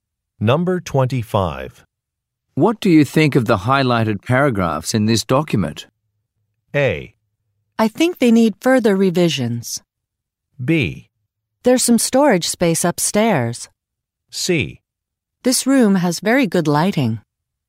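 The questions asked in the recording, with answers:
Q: What do you think of the highlighted paragraphs in this document?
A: A: I think they need further revisions.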